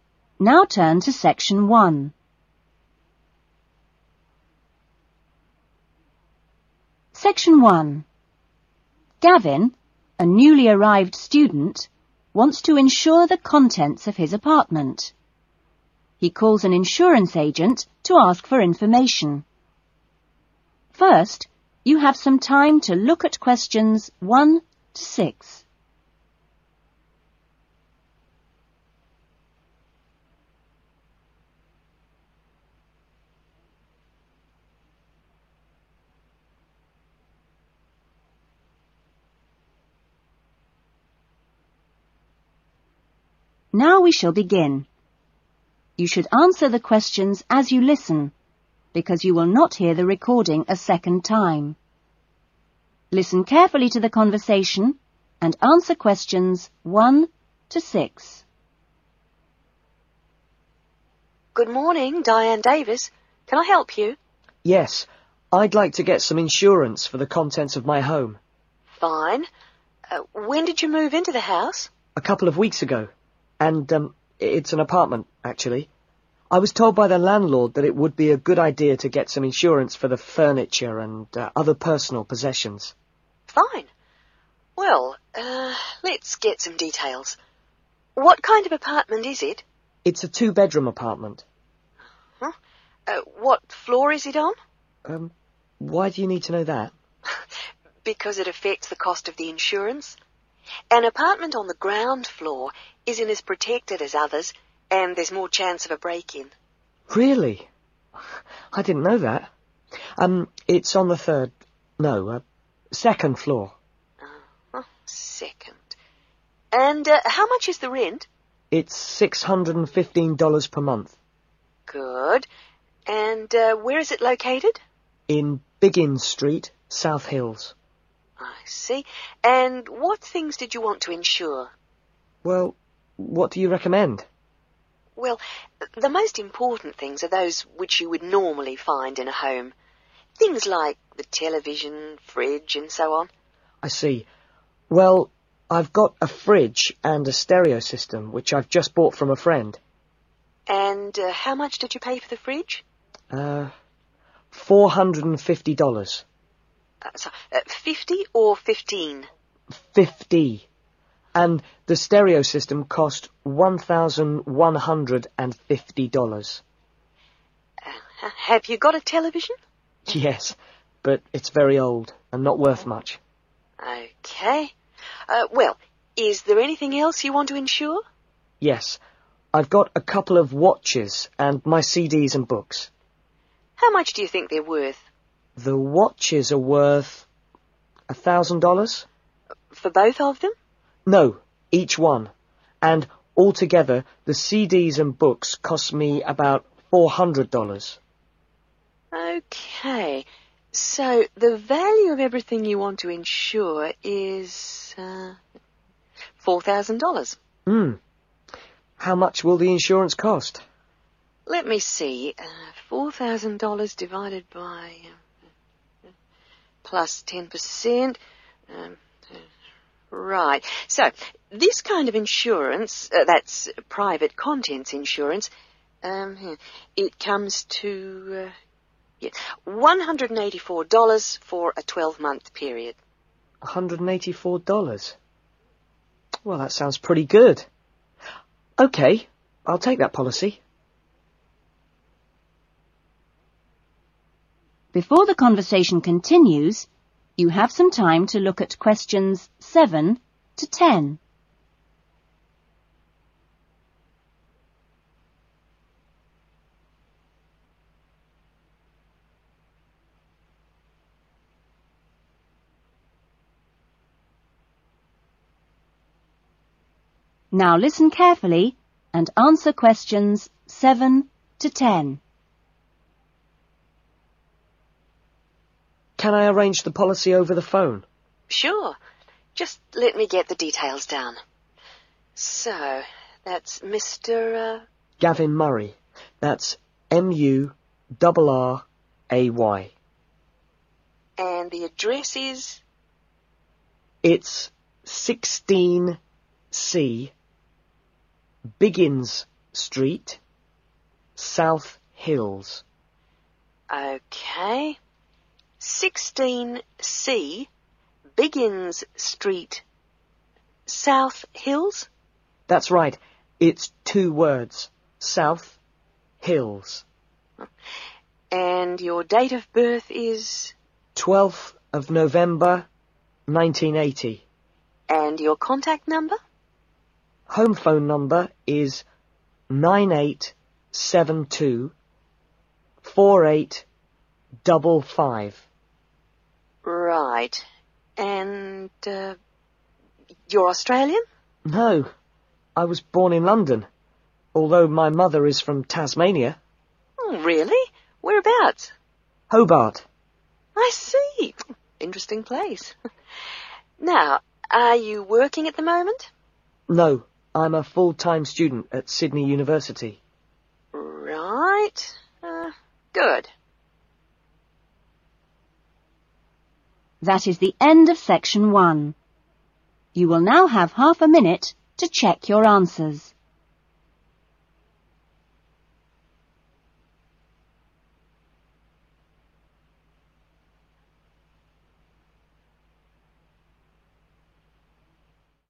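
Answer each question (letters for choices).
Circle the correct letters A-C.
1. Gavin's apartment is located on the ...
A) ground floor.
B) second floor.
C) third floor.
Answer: B

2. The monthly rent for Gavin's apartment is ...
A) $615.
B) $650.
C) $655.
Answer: A

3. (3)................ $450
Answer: fridge

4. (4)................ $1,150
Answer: stereo system

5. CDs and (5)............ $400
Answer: books

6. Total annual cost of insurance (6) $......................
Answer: 184

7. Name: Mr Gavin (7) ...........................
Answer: Murray

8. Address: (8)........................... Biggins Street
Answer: 16C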